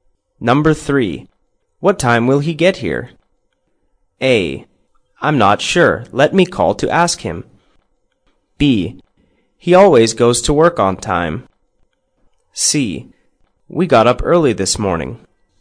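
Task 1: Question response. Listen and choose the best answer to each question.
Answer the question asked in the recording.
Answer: I'm not sure. Let me call to ask him.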